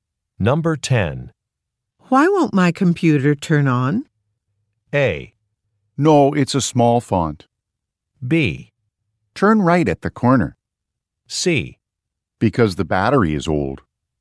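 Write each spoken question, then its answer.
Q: Why won't my computer turn on?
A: C: Because the battery is old.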